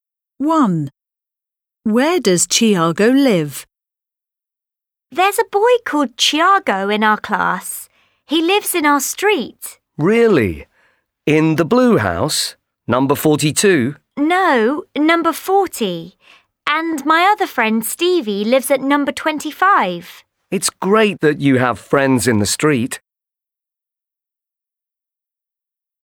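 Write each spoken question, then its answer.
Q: Where does Thiago live?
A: At number 40 in our street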